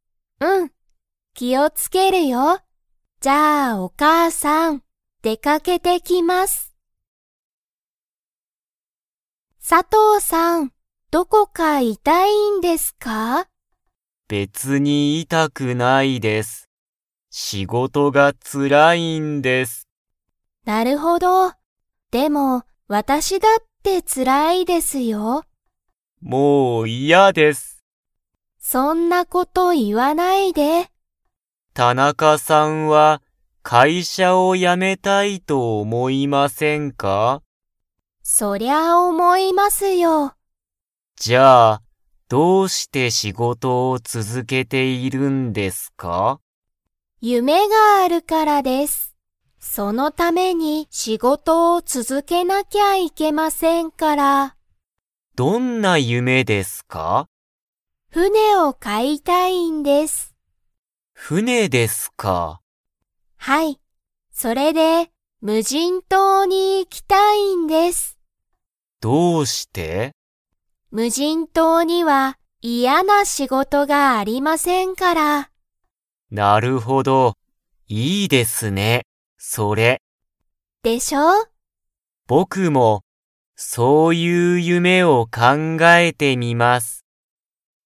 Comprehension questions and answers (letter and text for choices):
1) 佐藤さとうさんは、 。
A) どこか痛いたい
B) 別べつに痛いたくない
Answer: B) 別べつに痛いたくない

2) 田中たなかさんは、何なにを買かいたいですか?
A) 会社かいしゃ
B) 夢ゆめ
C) 船ふね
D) 無人むじん島じま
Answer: C) 船ふね

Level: Level 3